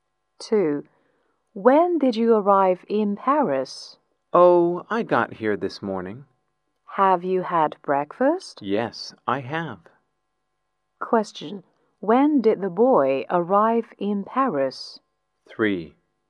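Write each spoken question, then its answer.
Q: Question. When did the boy arrive in Paris?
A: This morning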